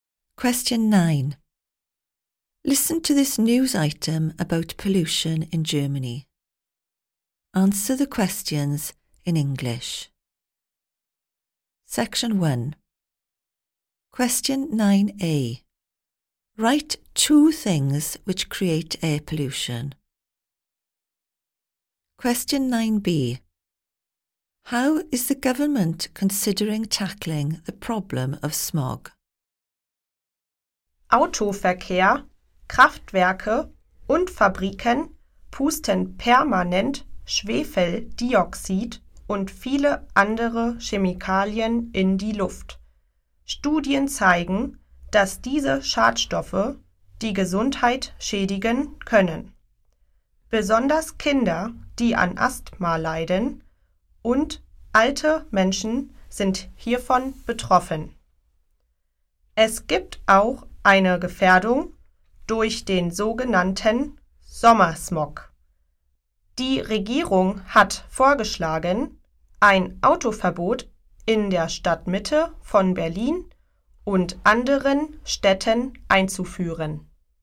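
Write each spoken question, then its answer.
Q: Write two things which create air pollution.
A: Car traffic, power stations, factories

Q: How is the government considering tackling the problem of smog?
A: Banning cars in the centre of Berlin and other cities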